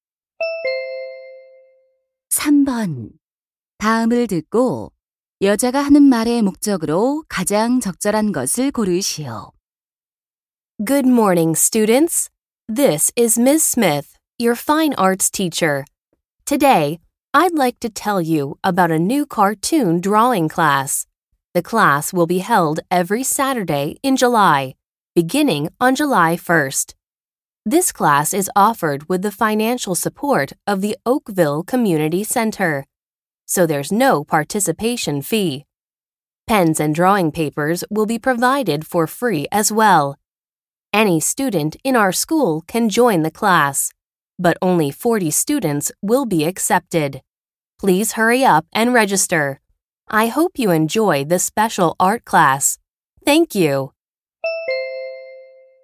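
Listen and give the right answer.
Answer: 새 만화 그리기 수업을 홍보하고 등록을 권하려고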